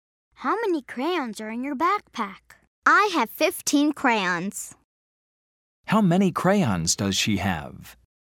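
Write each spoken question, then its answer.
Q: How many crayons does she have?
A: 15 crayons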